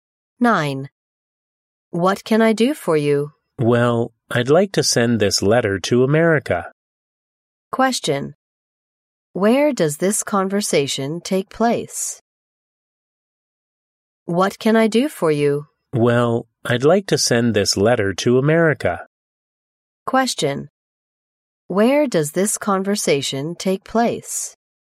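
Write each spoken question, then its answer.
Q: Where does this conversation take place?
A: At a post office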